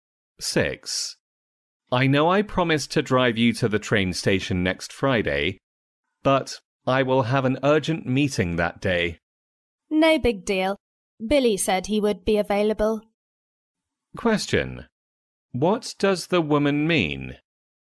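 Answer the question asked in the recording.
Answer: It doesn't matter; Billy can drive her to the station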